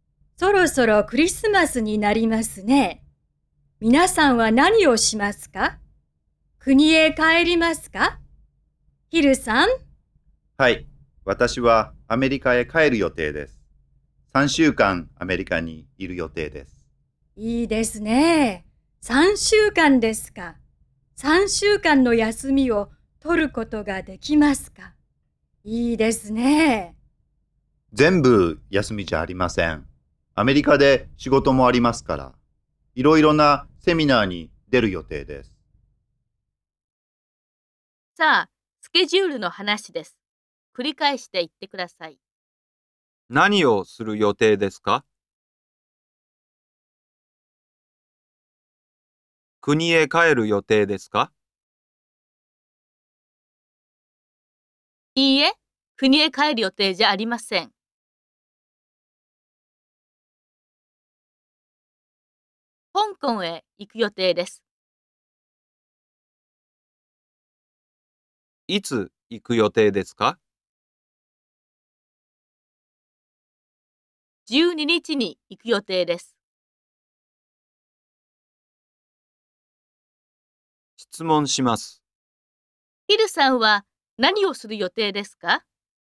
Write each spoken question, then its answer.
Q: ヒルさんは何をする予定ですか?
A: アメリカへ帰る予定です。